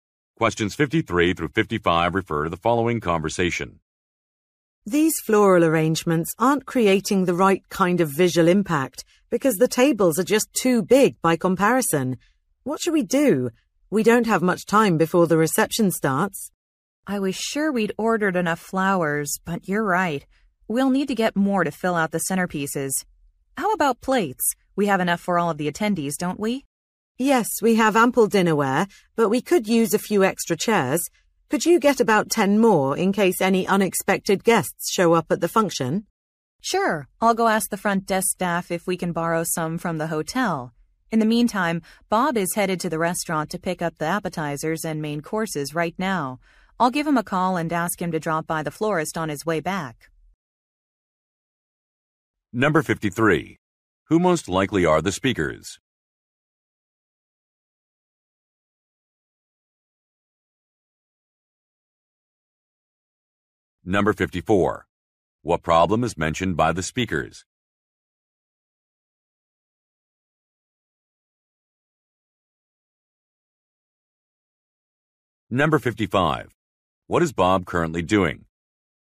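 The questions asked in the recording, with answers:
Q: What problem is mentioned by the speakers?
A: There are not enough flowers

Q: What is Bob currently doing?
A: Picking up food from a restaurant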